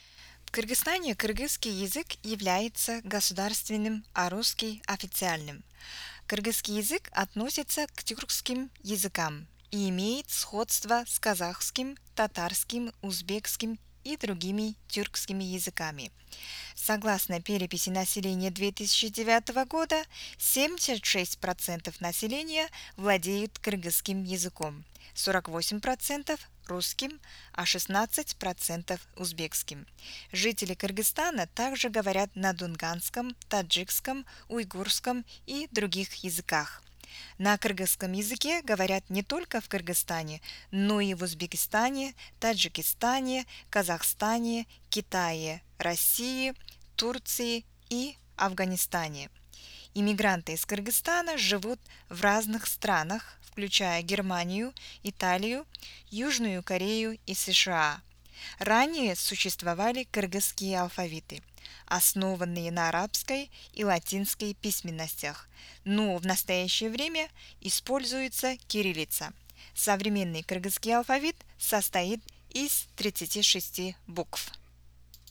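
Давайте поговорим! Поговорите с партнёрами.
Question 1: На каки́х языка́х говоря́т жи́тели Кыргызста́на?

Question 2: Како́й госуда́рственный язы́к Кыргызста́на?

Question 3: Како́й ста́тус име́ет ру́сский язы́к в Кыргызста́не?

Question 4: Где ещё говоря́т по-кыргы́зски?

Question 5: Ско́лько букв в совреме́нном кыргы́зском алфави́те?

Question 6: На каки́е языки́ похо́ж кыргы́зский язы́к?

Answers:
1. на кыргызском, русском, узбекском, дунганском, таджикском, уйгурском и других языках
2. кыргызский
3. официальный
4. в Узбекистане, Таджикистане, Казахстане, Китае, России, Турции и Афганистане
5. 36
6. на казахский, татарский, узбекский и другие тюркские языки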